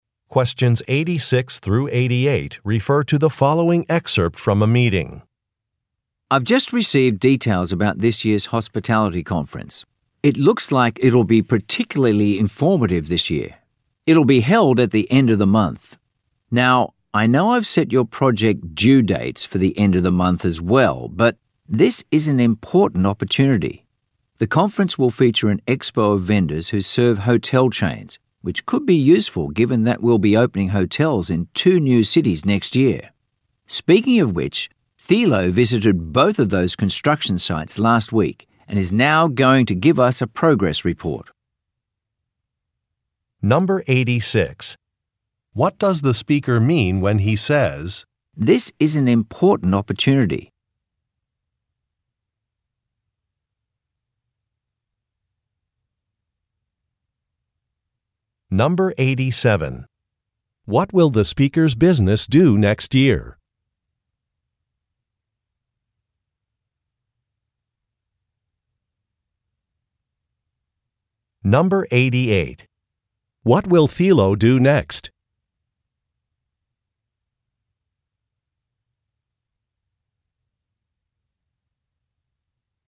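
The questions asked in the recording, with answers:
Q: What will the speaker's business do next year?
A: Open hotels in two new cities

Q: What will Thilo do next?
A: Give a progress report on the construction sites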